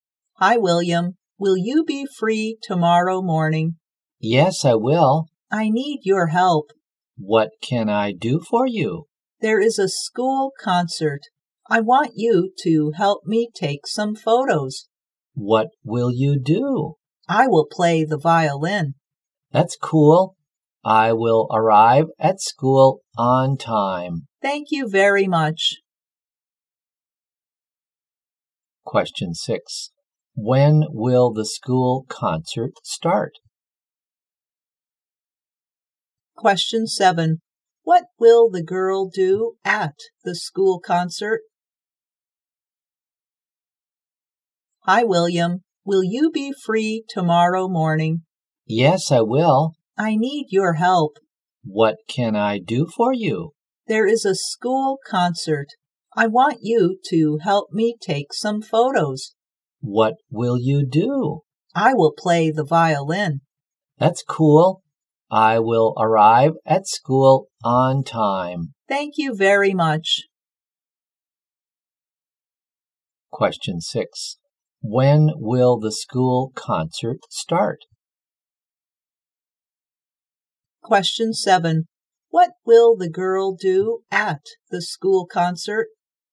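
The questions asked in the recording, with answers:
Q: What will the girl do at the school concert?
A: Play the violin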